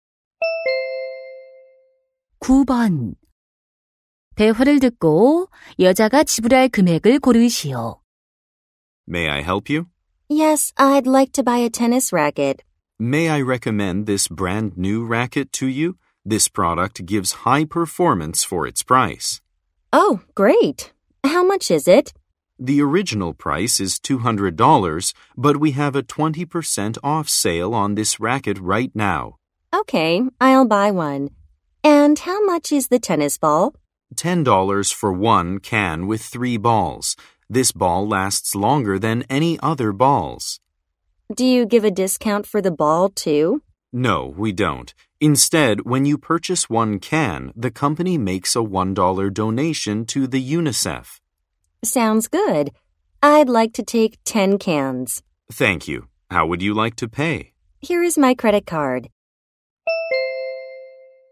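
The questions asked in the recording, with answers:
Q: 대화를 듣고 여자가 지불할 금액을 고르시오.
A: $260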